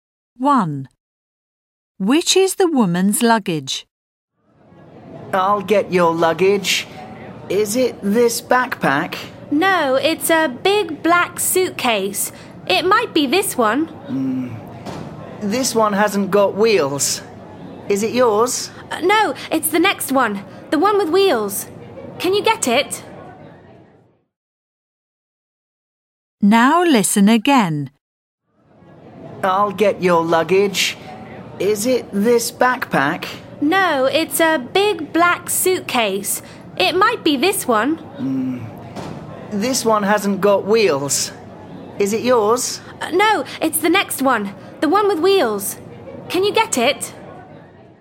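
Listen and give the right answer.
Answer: The big black suitcase with wheels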